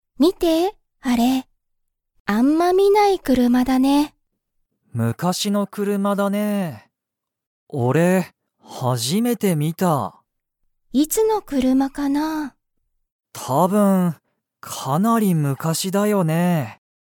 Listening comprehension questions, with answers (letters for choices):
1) それは、____車くるまだ。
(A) よく見みる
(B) 最近さいきんの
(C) かなり昔むかしの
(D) 俺おれの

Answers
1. C